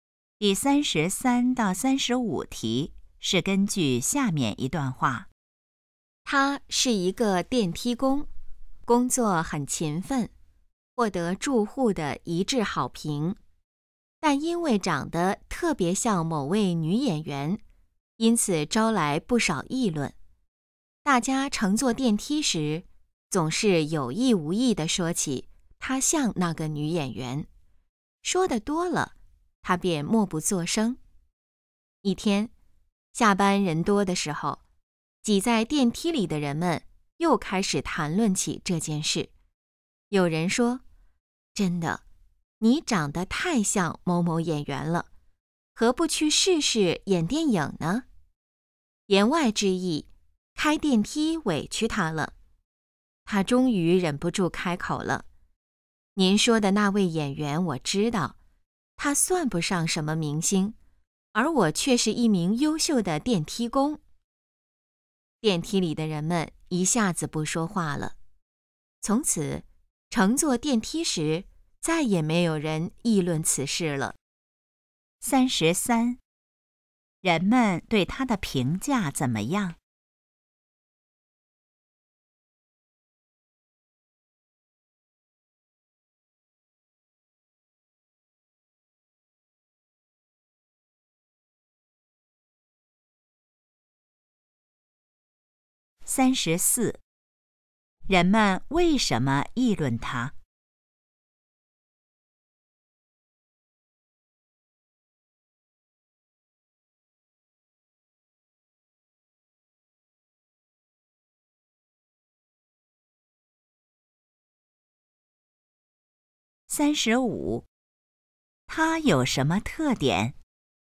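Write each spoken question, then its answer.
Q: 人们对他的评价怎么样?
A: 一致好评

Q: 人们为什么议论他?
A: 长得像某位女演员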